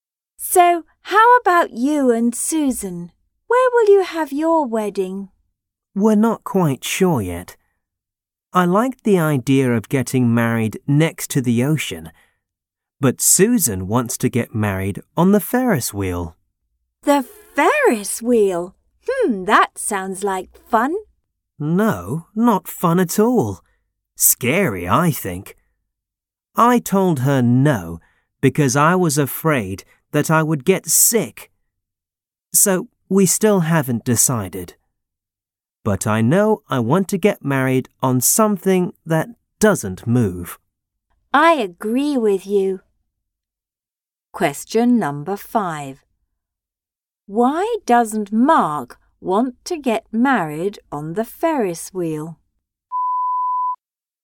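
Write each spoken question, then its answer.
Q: Why doesn't Mark want to get married on the Ferris wheel?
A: He was afraid he would get sick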